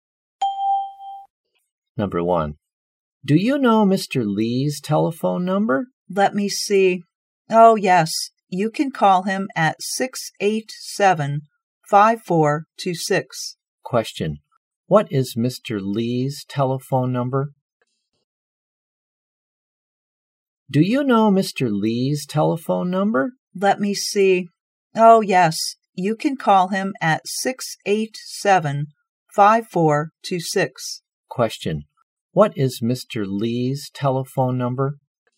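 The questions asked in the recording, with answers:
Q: What is Mr. Lee's telephone number?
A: 687-5426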